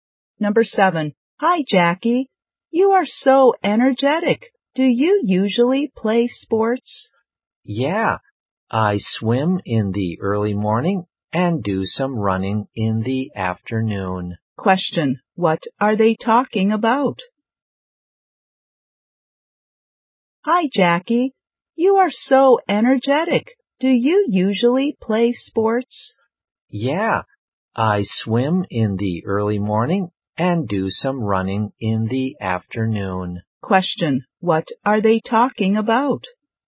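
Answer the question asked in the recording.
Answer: Sports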